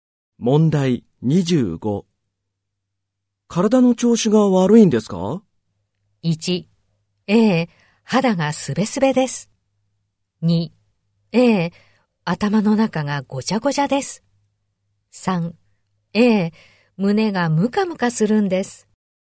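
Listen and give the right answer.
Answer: 3: ええ、胸がムカムカするんです。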